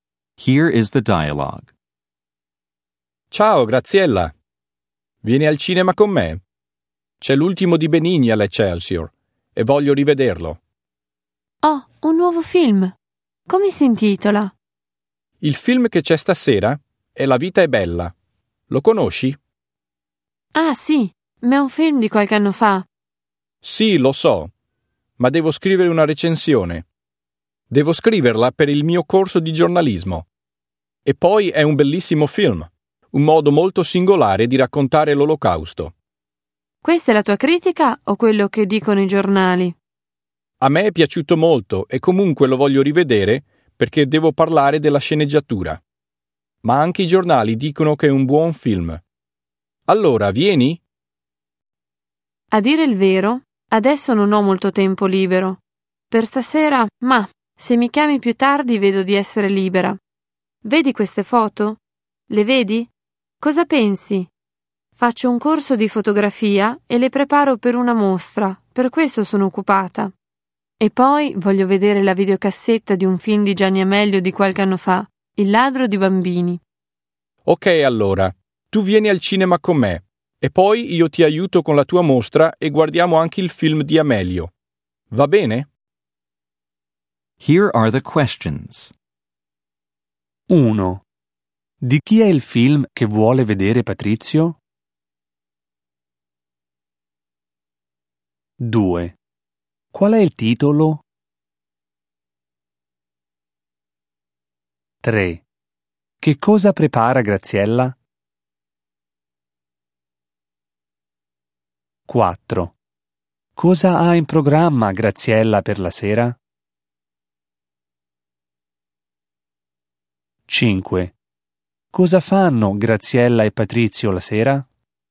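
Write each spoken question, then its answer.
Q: Di chi è il film che vuole vedere Patrizio?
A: Di Benigni

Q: Qual è il titolo?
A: La vita è bella

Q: Che cosa prepara Graziella?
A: Delle foto per una mostra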